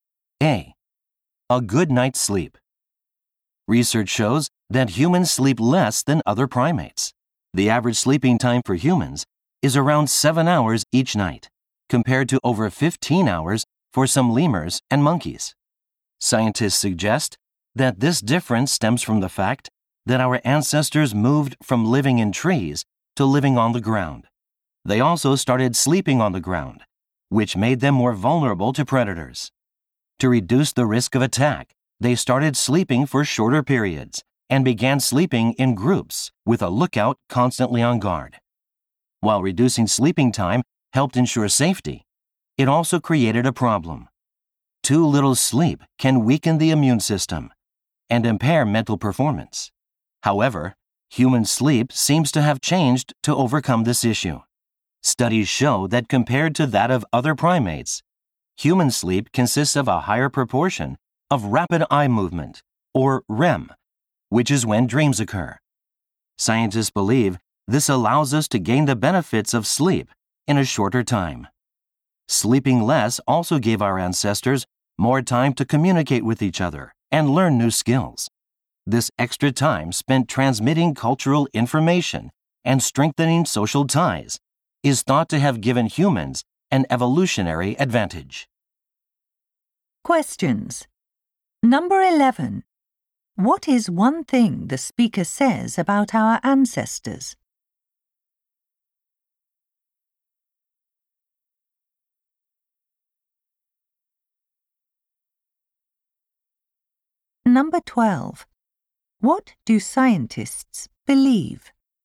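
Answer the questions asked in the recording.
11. They slept for shorter periods and in groups to reduce the risk of attack after moving to the ground.
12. A higher proportion of REM sleep lets humans gain sleep's benefits in a shorter time.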